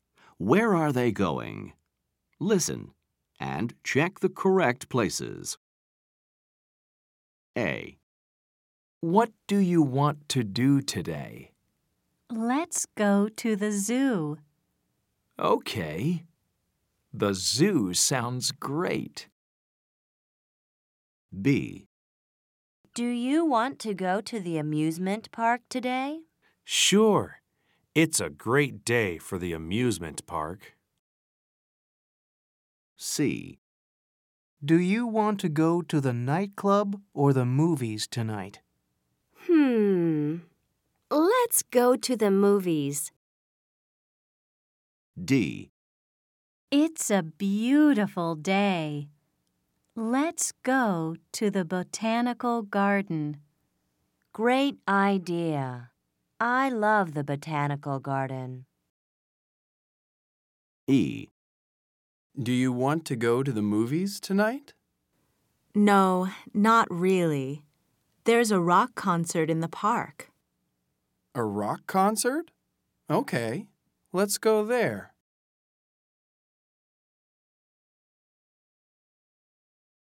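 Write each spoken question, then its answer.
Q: Where are they going?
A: the zoo

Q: Where are they going?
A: the amusement park

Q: Where are they going?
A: the movies

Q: Where are they going?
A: the botanical garden

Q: Where are they going?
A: a rock concert in the park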